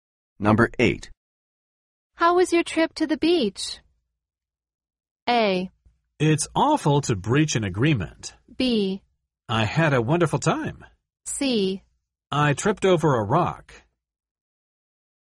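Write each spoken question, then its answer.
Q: How was your trip to the beach?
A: B: I had a wonderful time.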